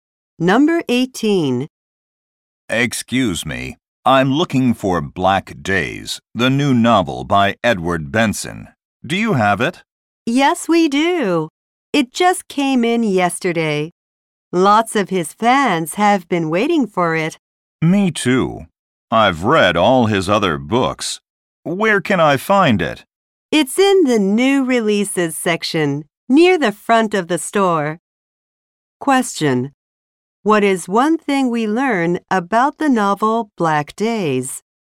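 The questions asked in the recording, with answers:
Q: What is one thing we learn about the novel Black Days?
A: It arrived at the store yesterday.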